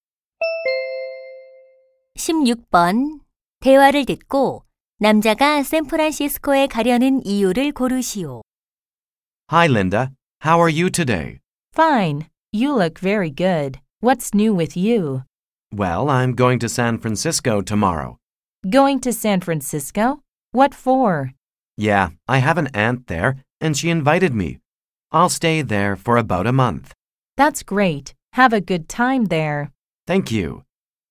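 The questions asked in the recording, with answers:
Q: 대화를 듣고 남자가 샌프란시스코에 가려는 이유를 고르시오.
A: 이모(고모)의 초대를 받아서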